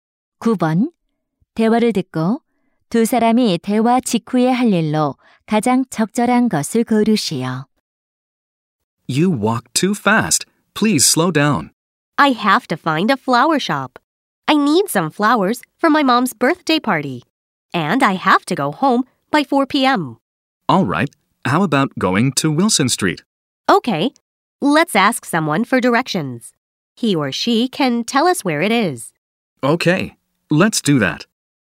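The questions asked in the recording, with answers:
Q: 대화를 듣고 두 사람이 대화 직후에 할 일로 가장 적절한 것을 고르시오.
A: 사람에게 길 묻기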